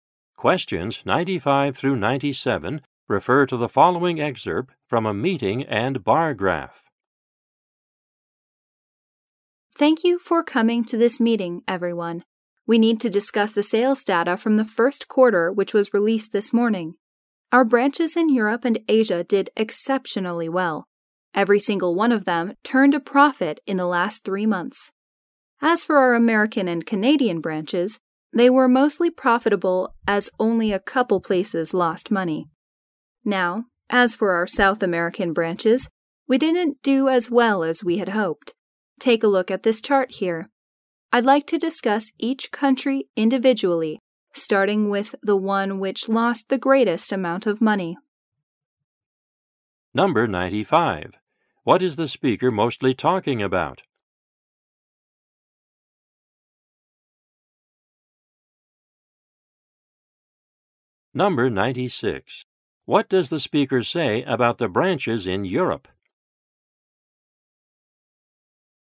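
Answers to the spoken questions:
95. First-quarter sales data
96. All of them made a profit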